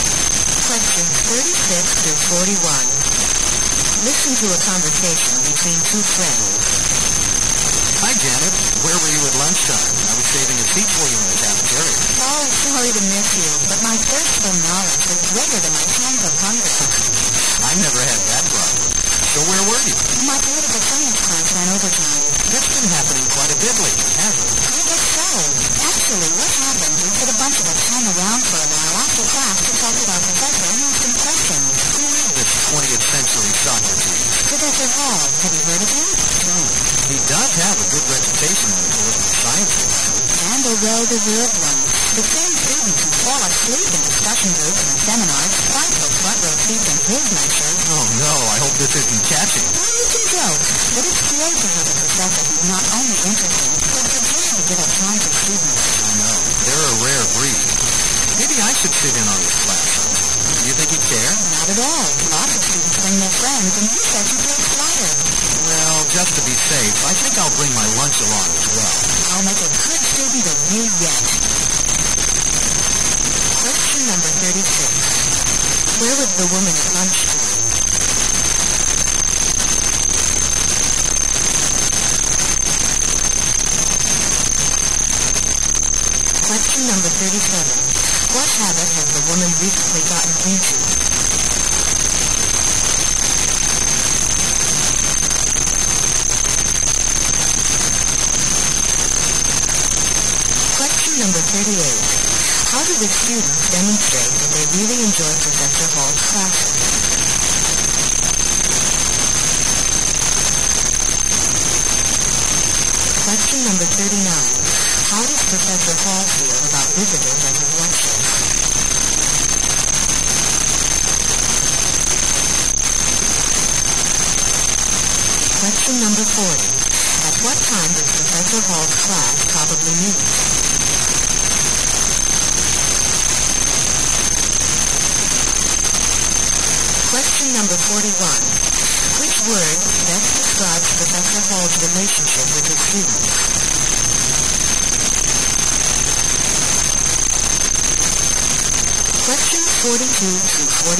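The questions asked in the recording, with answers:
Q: Where was the woman at lunchtime?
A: In her political science class, talking with the professor

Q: How do the students demonstrate that they really enjoy Professor Hall's classes?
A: They fight for front-row seats

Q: How does Professor Hall feel about visitors at his lectures?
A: He feels flattered

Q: At what time does Professor Hall's class probably meet?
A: Around lunchtime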